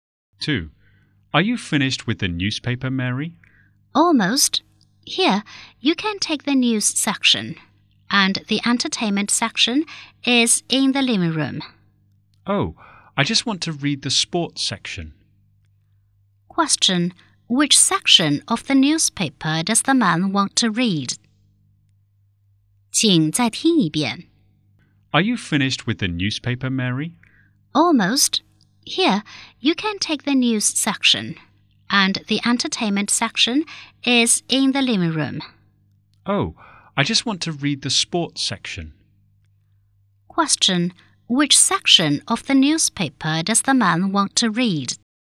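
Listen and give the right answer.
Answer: The sports section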